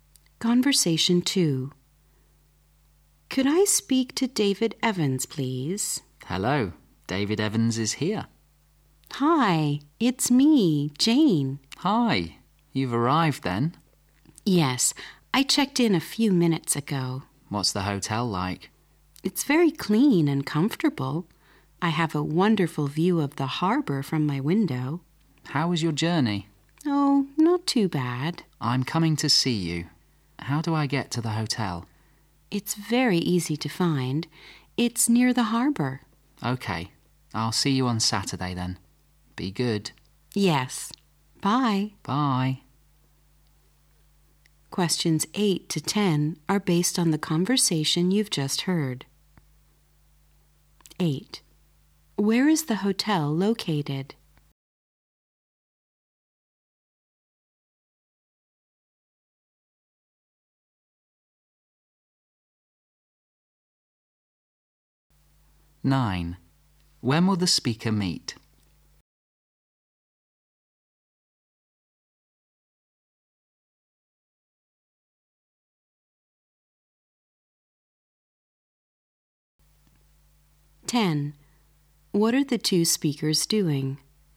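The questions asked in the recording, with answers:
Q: Where is the hotel located?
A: Near the harbour

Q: When will the speaker meet?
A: On Saturday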